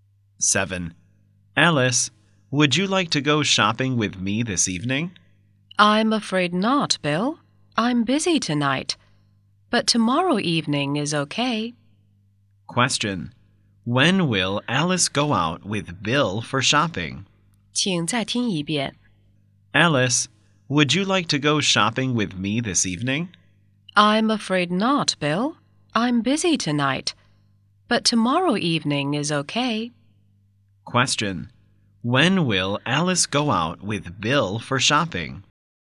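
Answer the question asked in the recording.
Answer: Tomorrow evening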